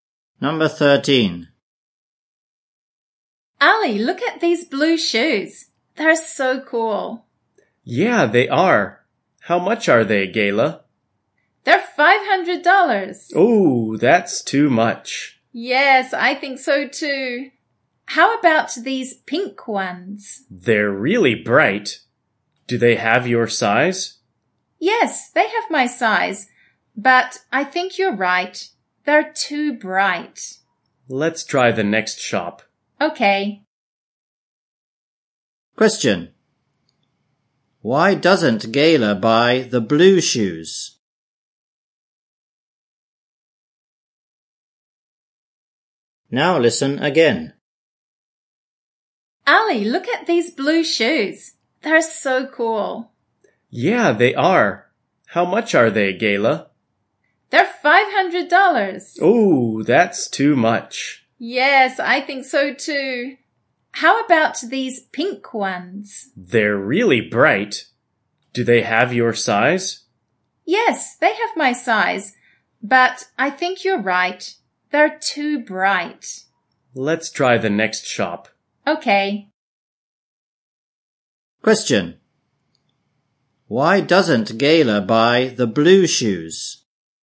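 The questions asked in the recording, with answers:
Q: Why doesn't Gayla buy the blue shoes?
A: They are too expensive ($500)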